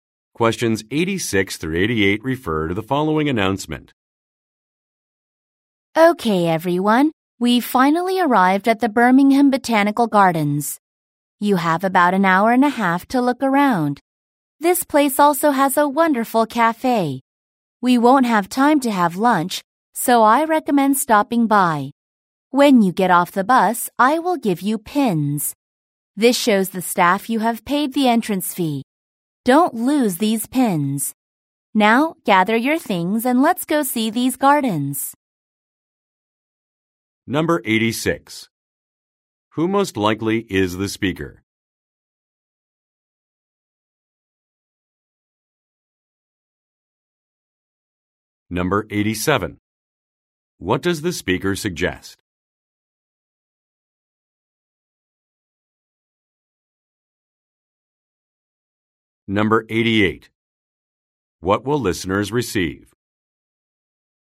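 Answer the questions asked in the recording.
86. A tour guide
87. Stopping by the cafe
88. Pins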